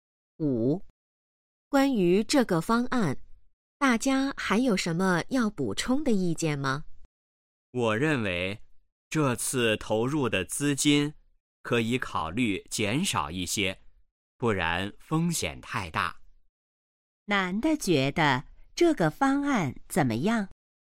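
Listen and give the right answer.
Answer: 风险太大,应减少投入资金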